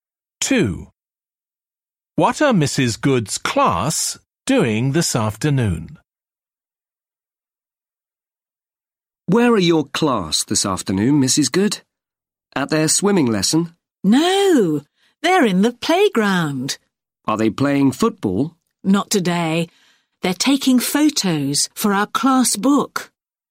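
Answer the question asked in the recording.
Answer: Taking photos in the playground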